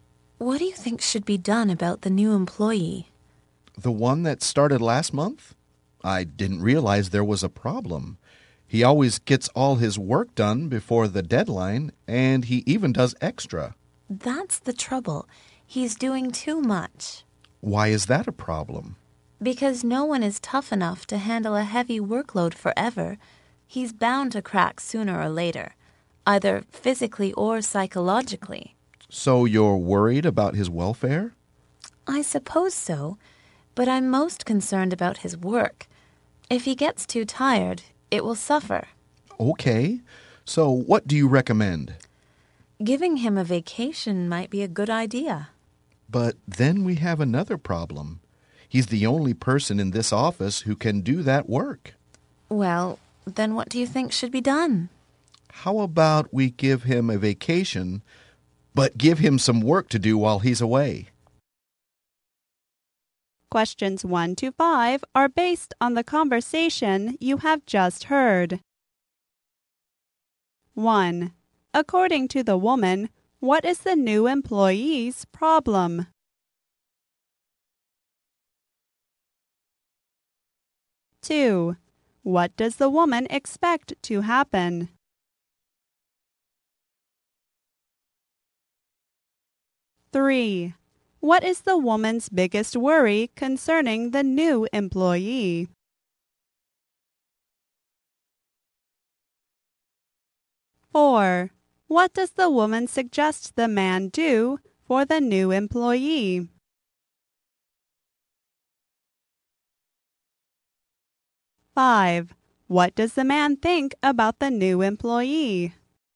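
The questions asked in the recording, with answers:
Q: According to the woman, what is the new employee's problem?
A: He is doing too much work.

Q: What does the woman expect to happen?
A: He will crack sooner or later, physically or psychologically.

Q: What is the woman's biggest worry concerning the new employee?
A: His work will suffer.

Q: What does the woman suggest the man do for the new employee?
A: Give him a vacation.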